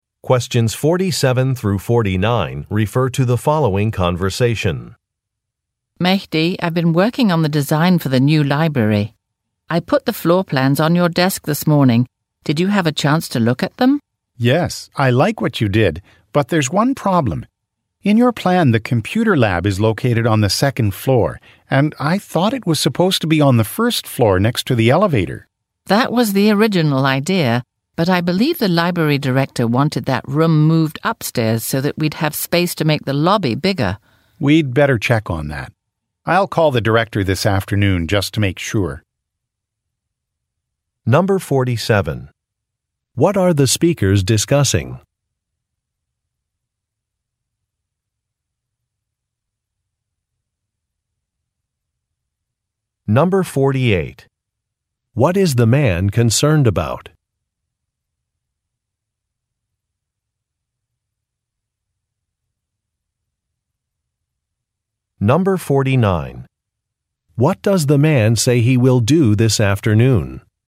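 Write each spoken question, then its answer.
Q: What are the speakers discussing?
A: The design of a new library

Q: What is the man concerned about?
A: The location of the computer lab

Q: What does the man say he will do this afternoon?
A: Call the library director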